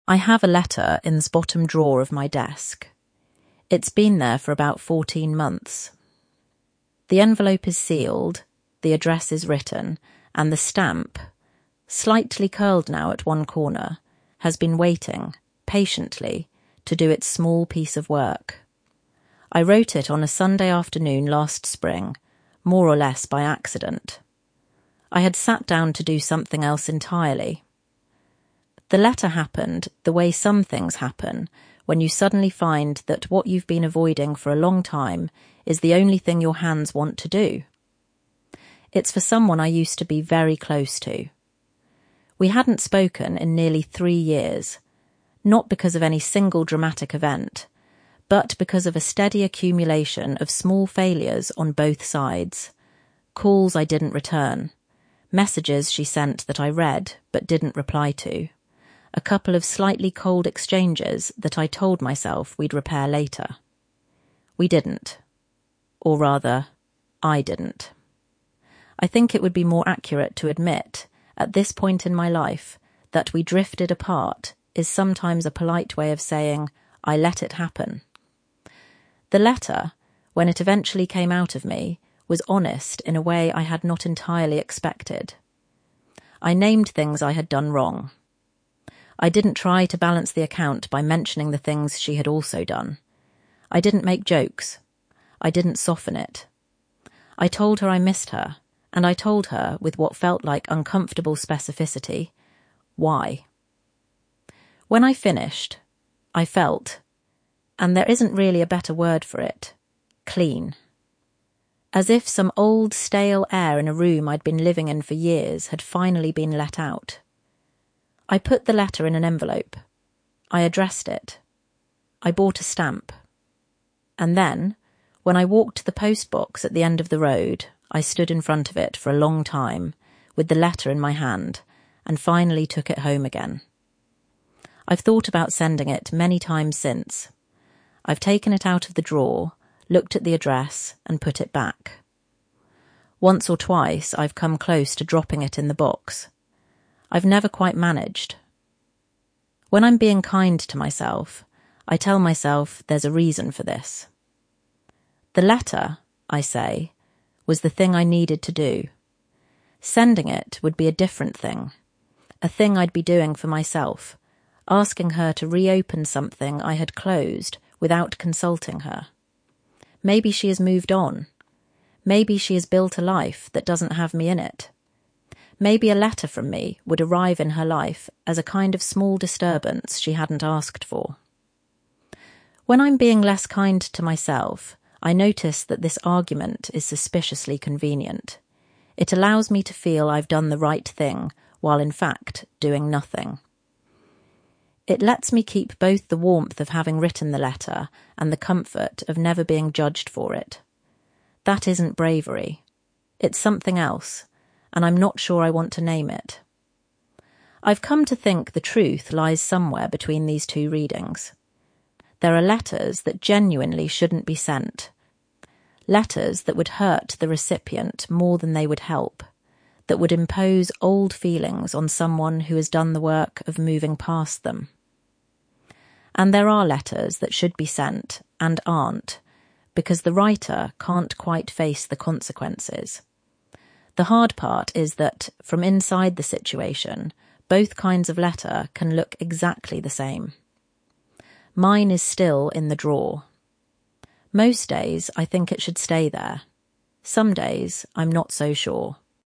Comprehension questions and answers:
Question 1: What did the writer NOT do in the letter?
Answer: The writer didn't try to balance the account by mentioning the things the other person had done; didn't make jokes; didn't soften it.

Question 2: What word does the writer use to describe how they felt after finishing the letter?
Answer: 'Clean'

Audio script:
I have a letter in the bottom drawer of my desk. It's been there for about fourteen months. The envelope is sealed, the address is written, and the stamp — slightly curled now at one corner — has been waiting, patiently, to do its small piece of work.
I wrote it on a Sunday afternoon last spring, more or less by accident. I had sat down to do something else entirely; the letter happened the way some things happen, when you suddenly find that what you've been avoiding for a long time is the only thing your hands want to do.
It's for someone I used to be very close to. We hadn't spoken in nearly three years, not because of any single dramatic event, but because of a steady accumulation of small failures on both sides — calls I didn't return, messages she sent that I read but didn't reply to, a couple of slightly cold exchanges that I told myself we'd repair later. We didn't. Or rather, I didn't. I think it would be more accurate to admit, at this point in my life, that 'we drifted apart' is sometimes a polite way of saying 'I let it happen'.
The letter, when it eventually came out of me, was honest in a way I had not entirely expected. I named things I had done wrong. I didn't try to balance the account by mentioning the things she had also done. I didn't make jokes. I didn't soften it. I told her I missed her, and I told her, with what felt like uncomfortable specificity, why.
When I finished, I felt — and there isn't really a better word for it — clean. As if some old, stale air in a room I'd been living in for years had finally been let out.
I put the letter in an envelope. I addressed it. I bought a stamp. And then, when I walked to the post box at the end of the road, I stood in front of it for a long time, with the letter in my hand, and finally took it home again.
I've thought about sending it many times since. I've taken it out of the drawer, looked at the address, and put it back. Once or twice I've come close to dropping it in the box. I've never quite managed.
When I'm being kind to myself, I tell myself there's a reason for this. The letter, I say, was the thing I needed to do. Sending it would be a different thing — a thing I'd be doing for myself, asking her to reopen something I had closed without consulting her. Maybe she has moved on. Maybe she has built a life that doesn't have me in it. Maybe a letter from me would arrive in her life as a kind of small disturbance she hadn't asked for.
When I'm being less kind to myself, I notice that this argument is suspiciously convenient. It allows me to feel I've done the right thing while in fact doing nothing. It lets me keep both the warmth of having written the letter and the comfort of never being judged for it. That isn't bravery. It's something else, and I'm not sure I want to name it.
I've come to think the truth lies somewhere between these two readings. There are letters that genuinely shouldn't be sent — letters that would hurt the recipient more than they would help, that would impose old feelings on someone who has done the work of moving past them. And there are letters that should be sent, and aren't, because the writer can't quite face the consequences. The hard part is that, from inside the situation, both kinds of letter can look exactly the same.
Mine is still in the drawer. Most days, I think it should stay there. Some days, I'm not so sure.
accumulation